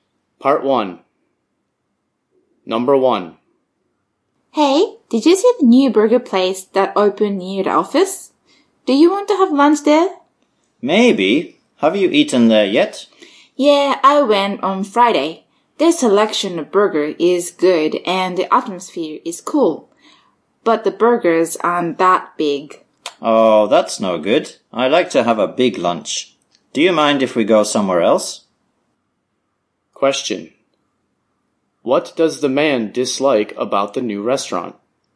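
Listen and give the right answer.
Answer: The burgers aren't that big.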